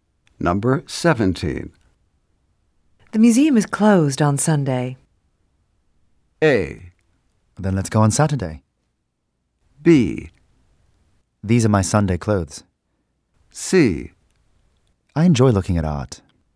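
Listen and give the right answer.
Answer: A: Then let's go on Saturday.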